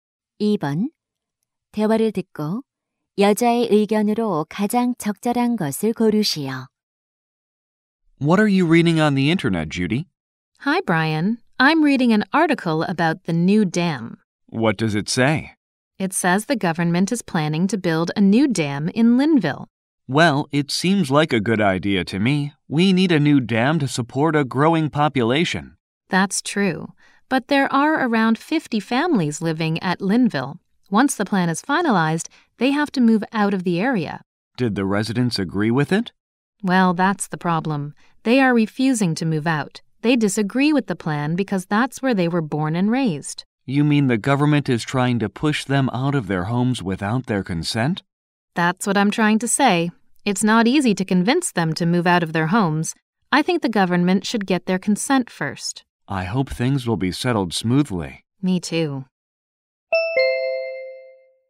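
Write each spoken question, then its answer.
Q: 대화를 듣고 여자의 의견으로 가장 적절한 것을 고르시오.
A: 정부는 댐 건설 전에 주민의 동의를 먼저 얻어야 한다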